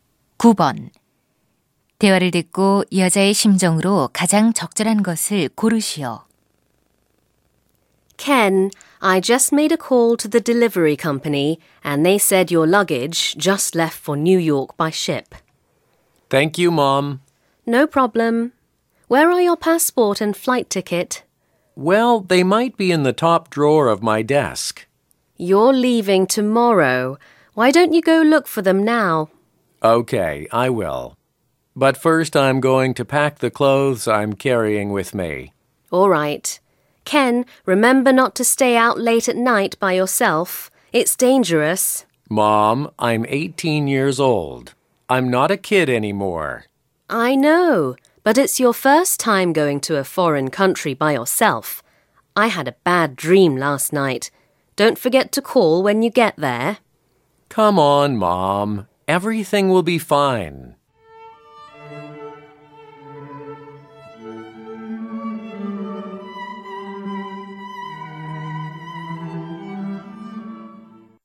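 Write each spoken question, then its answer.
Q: 대화를 듣고 여자의 심정으로 가장 적절한 것을 고르시오.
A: 걱정스러움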